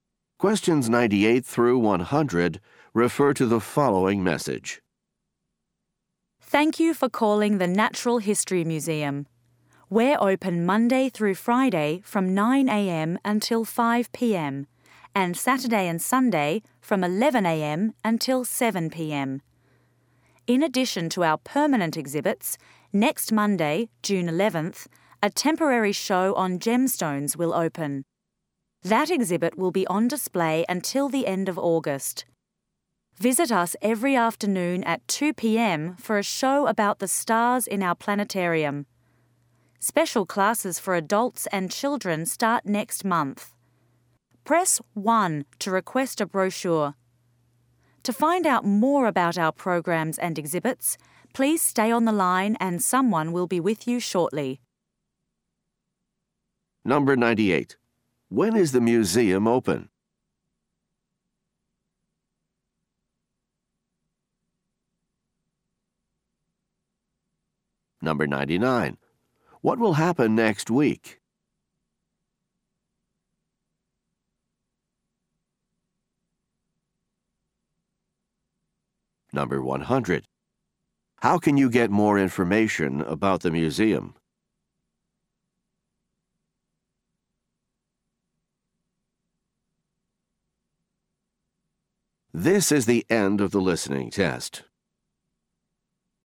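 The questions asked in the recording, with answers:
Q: When is the museum open?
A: Monday to Friday 9 a.m. to 5 p.m.; Saturday and Sunday 11 a.m. to 7 p.m.

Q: What will happen next week?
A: A temporary gemstone exhibit will open (Monday, June 11th).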